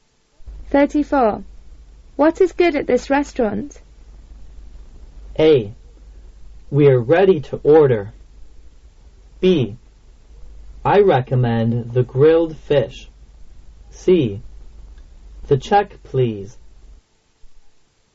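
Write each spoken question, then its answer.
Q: What is good at this restaurant?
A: B: I recommend the grilled fish.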